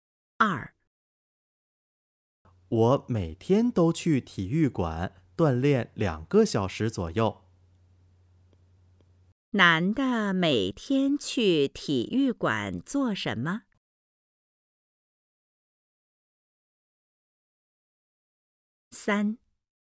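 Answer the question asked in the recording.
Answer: 锻炼(2个小时左右)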